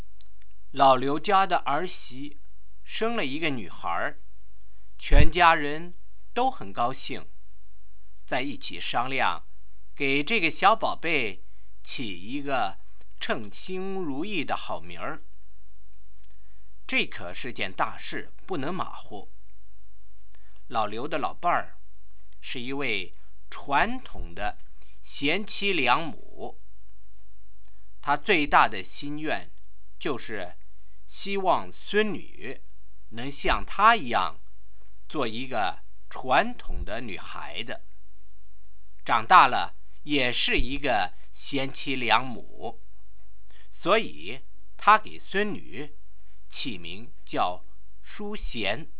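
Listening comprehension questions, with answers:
Why did Granny want to call the new born baby Shuxian?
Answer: Granny is a traditional good wife and loving mother, and she hopes her granddaughter will grow up to be a traditional girl and a good wife and mother like her.

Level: 2nd Year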